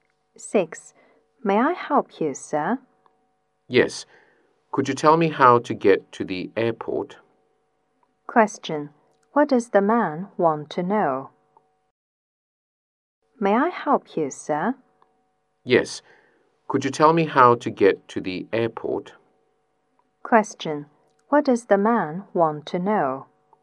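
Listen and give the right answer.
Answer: How to get to the airport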